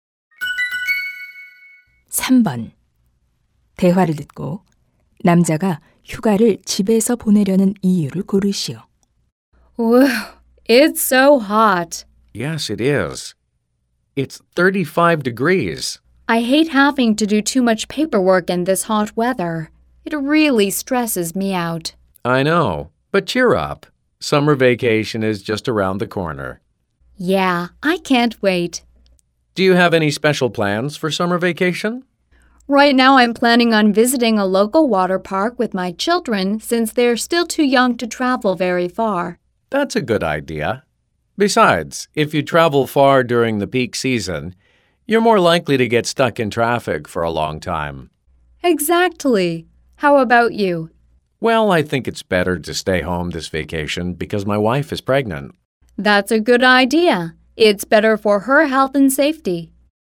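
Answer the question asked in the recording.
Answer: 아내가 임신 중이어서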